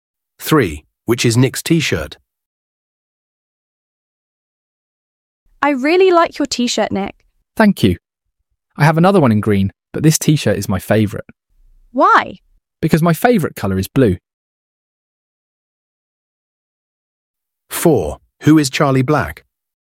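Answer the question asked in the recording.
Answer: The blue one.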